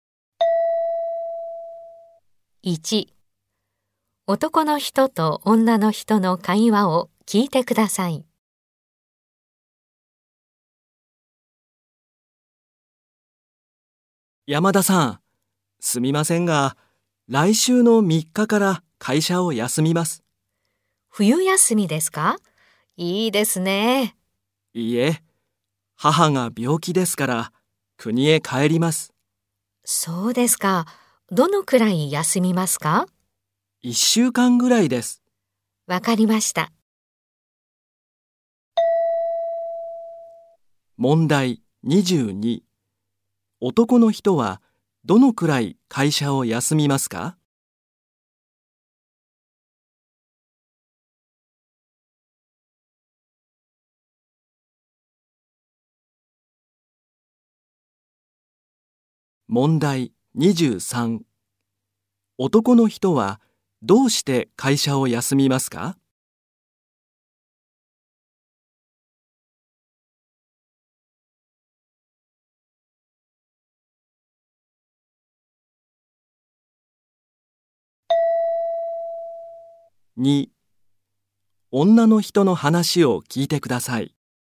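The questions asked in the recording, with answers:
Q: 男の人はどのくらい会社を休みますか?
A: 1週間ぐらい

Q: 男の人はどうして会社を休みますか?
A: 母が病気で国へ帰るから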